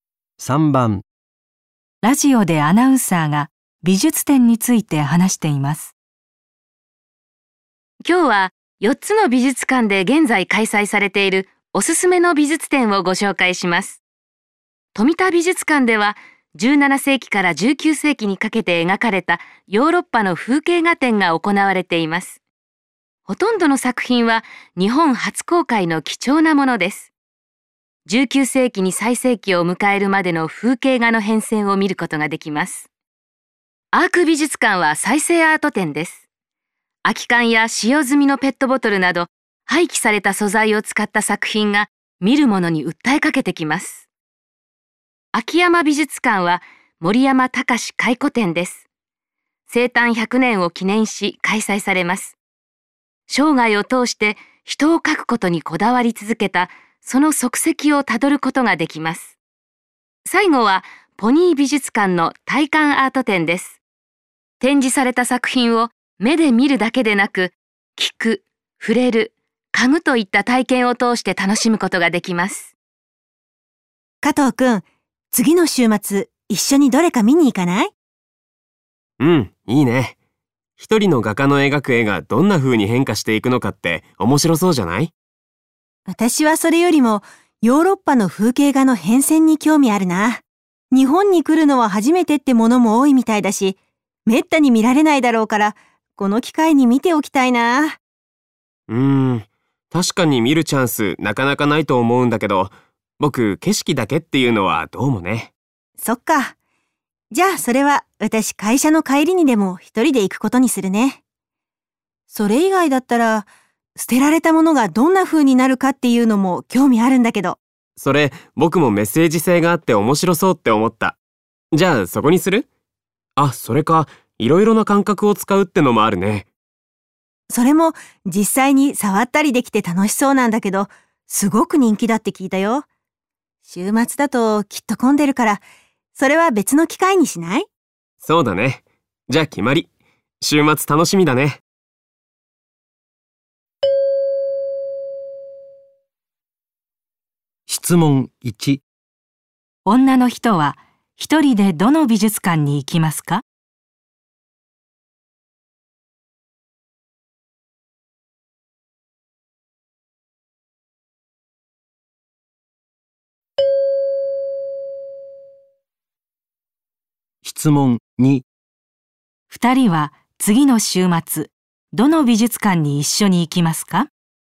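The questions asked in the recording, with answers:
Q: 女の人は一人でどの美術館に行きますか?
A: 富田美術館

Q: 二人は次の週末、どの美術館に一緒に行きますか?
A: アーク美術館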